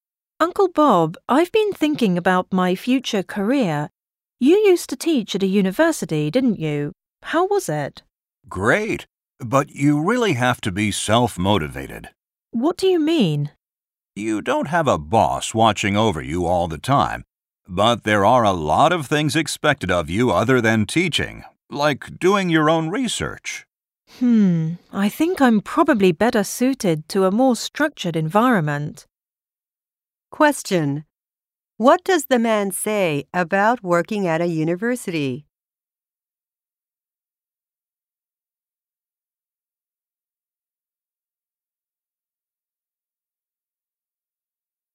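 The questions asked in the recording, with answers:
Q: What does the man say about working at a university?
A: You have to be self-motivated, since no boss watches over you and a lot is expected besides teaching, like doing your own research.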